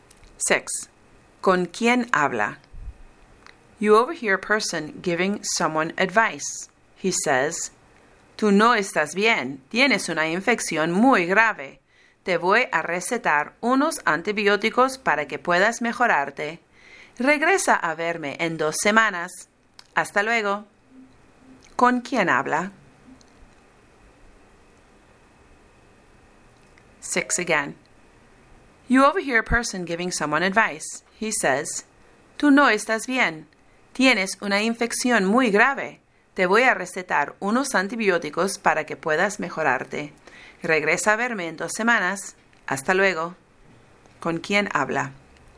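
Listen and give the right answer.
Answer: Con un médico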